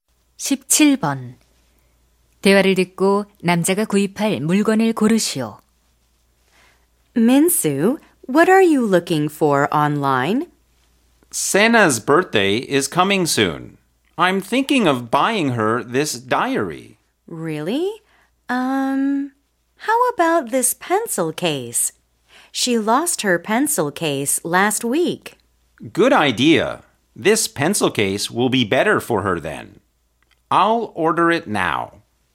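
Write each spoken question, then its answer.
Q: 대화를 듣고 남자가 구입할 물건을 고르시오.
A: 필통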